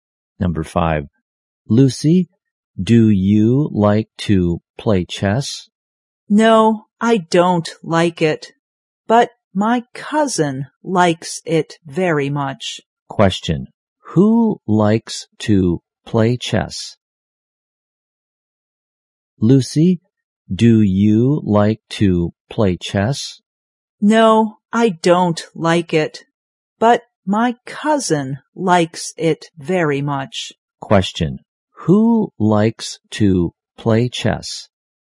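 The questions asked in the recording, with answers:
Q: who likes to play chess?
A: Lucy's cousin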